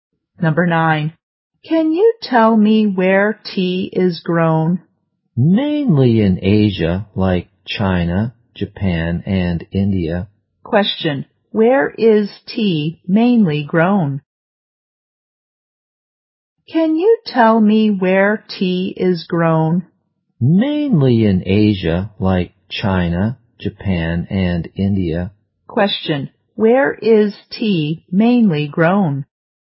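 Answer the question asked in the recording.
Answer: In Asia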